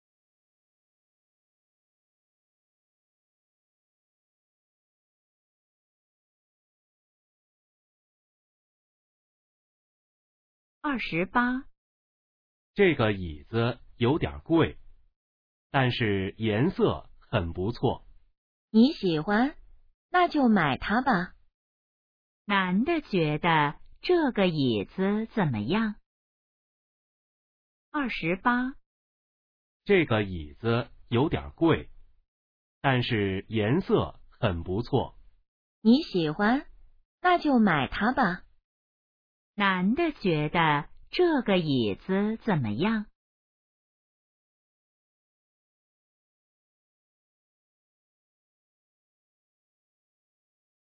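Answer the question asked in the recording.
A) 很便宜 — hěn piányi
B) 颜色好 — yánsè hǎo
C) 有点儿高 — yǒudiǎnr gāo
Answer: B) 颜色好 — yánsè hǎo

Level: HSK2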